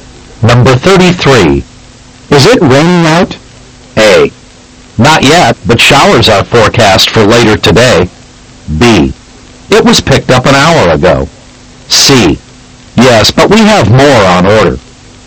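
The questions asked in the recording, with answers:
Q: Is it raining out?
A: A: Not yet, but showers are forecast for later today.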